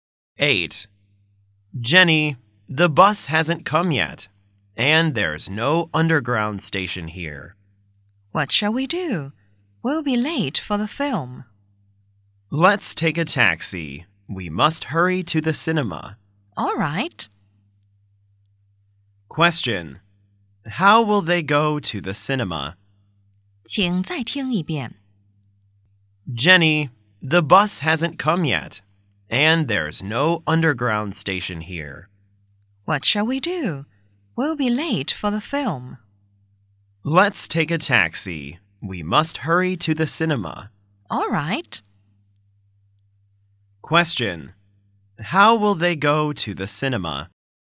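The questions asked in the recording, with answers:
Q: How will they go to the cinema?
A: By taxi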